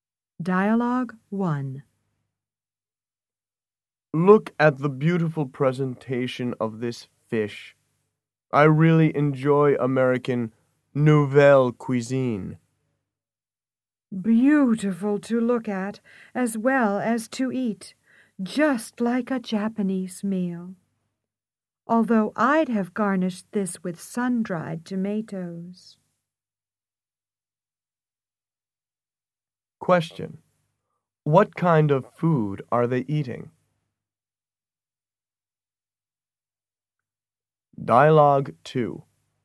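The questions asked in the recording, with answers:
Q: What kind of food are they eating?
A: American nouvelle cuisine (fish)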